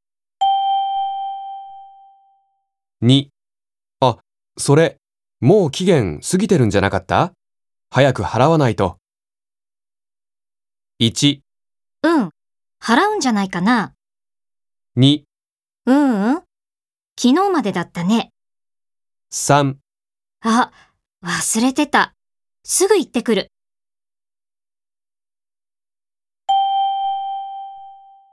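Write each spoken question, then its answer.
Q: あ、それ、もう期限過ぎてるんじゃなかった?早く払わないと。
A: 3: あ、忘れてた。すぐ行ってくる。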